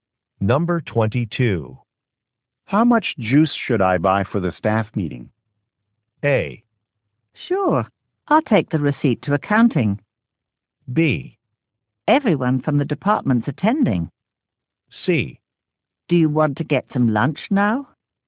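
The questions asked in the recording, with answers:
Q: How much juice should I buy for the staff meeting?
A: B: Everyone from the department's attending.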